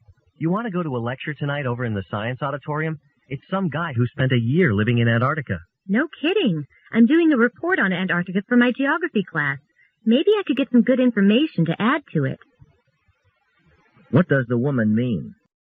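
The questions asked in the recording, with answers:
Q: What does the woman mean?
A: She'd like to go to the lecture because it may help with her report on Antarctica.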